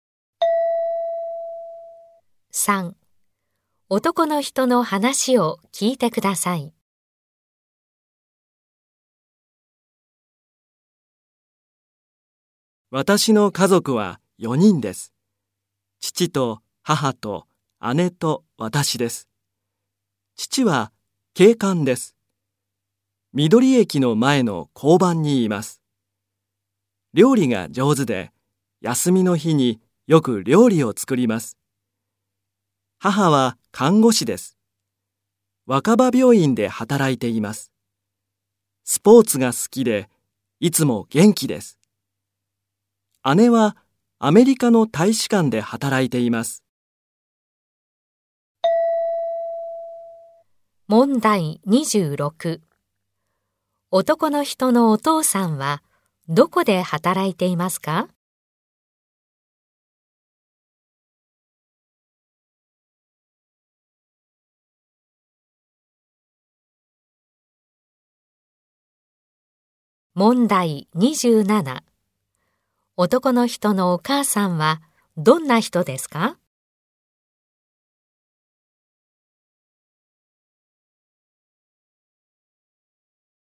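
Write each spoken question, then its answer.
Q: 男の人のお父さんはどこで働いていますか?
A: 緑駅の前の交番

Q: 男の人のお母さんはどんな人ですか?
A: スポーツが好きで、いつも元気な人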